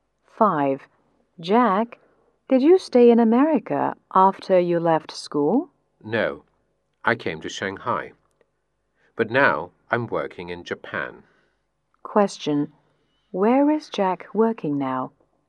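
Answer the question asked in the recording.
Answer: In Japan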